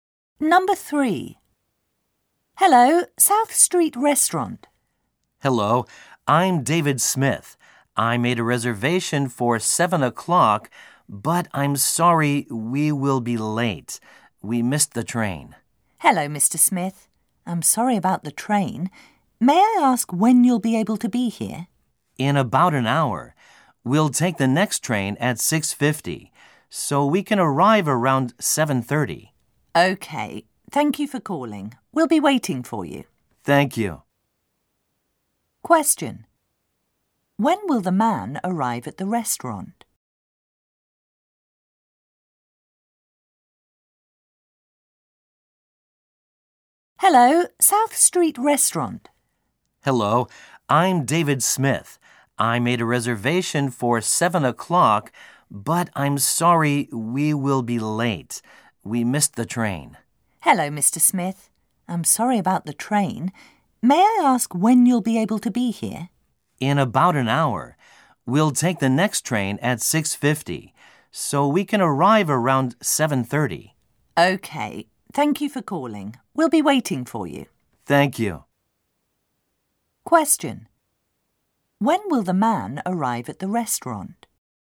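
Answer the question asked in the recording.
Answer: Around 7:30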